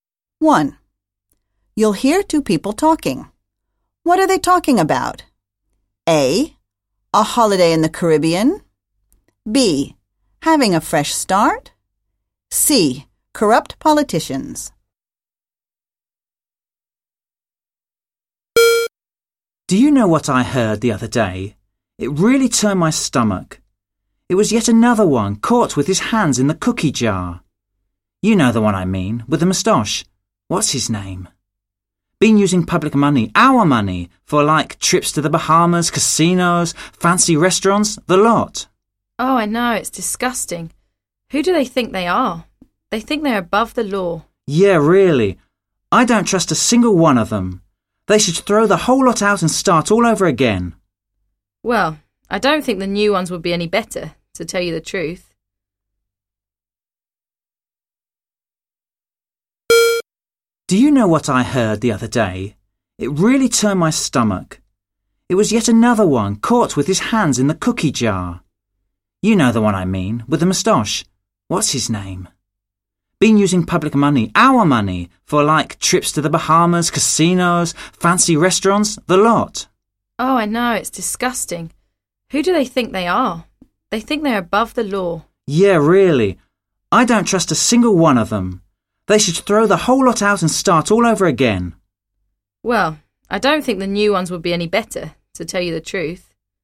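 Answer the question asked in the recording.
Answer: C: Corrupt politicians.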